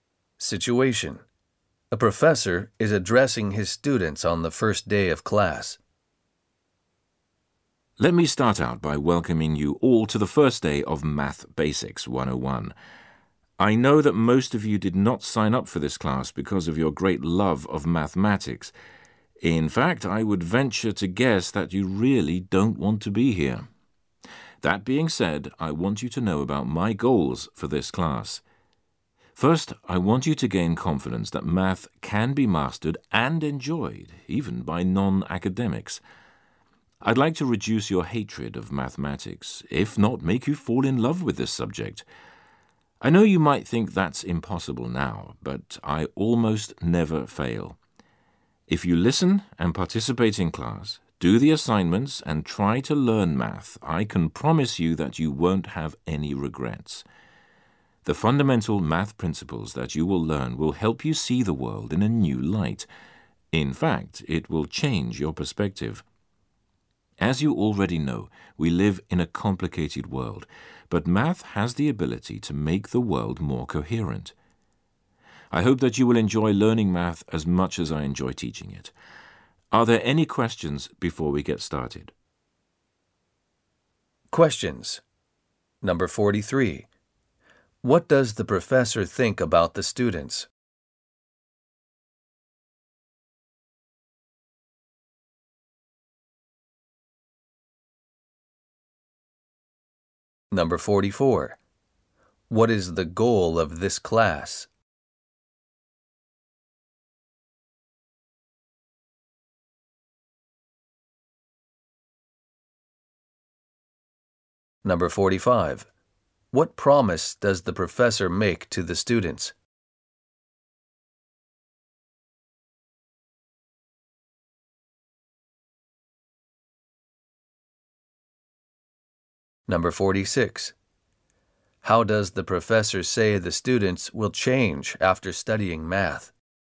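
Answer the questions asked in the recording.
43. He thinks most of them don't love math and don't really want to be in the class.
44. To help students gain confidence that math can be mastered and enjoyed, and to reduce their hatred of math.
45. If they listen, participate, do the assignments and try to learn, they won't have any regrets.
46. They will see the world in a new light; their perspective will change.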